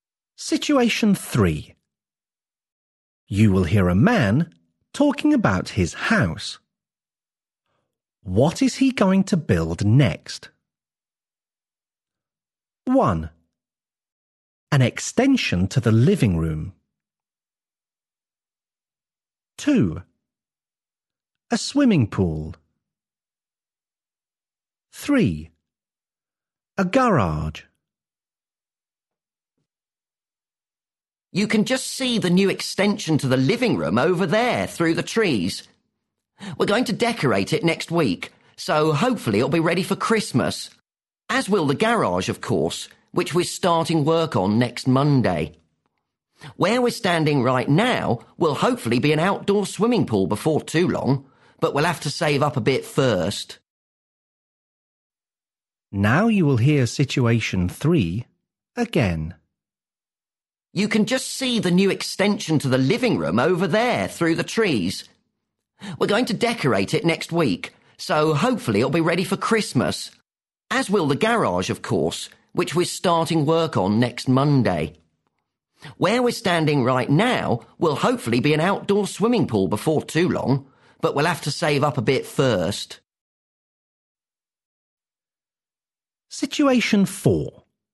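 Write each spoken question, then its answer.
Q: What is he going to build next?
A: 3: A garage.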